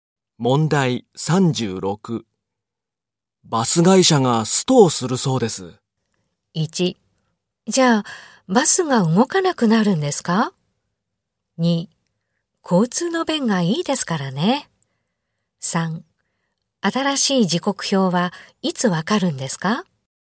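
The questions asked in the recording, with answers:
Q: バス会社がストをするそうです。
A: 1: じゃあ、バスが動かなくなるんですか?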